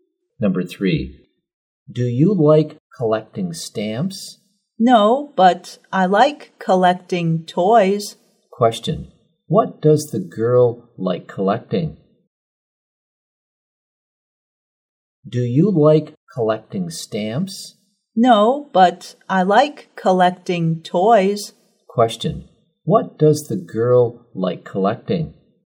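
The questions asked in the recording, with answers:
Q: Question, what does the girl like collecting?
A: Toys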